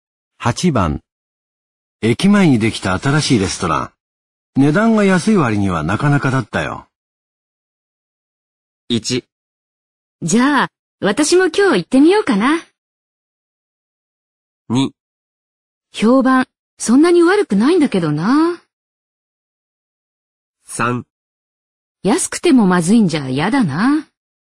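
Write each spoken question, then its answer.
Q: 駅前にできた新しいレストラン。値段が安い割にはなかなかだったよ。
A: 1: じゃあ、私も今日行ってみようかな。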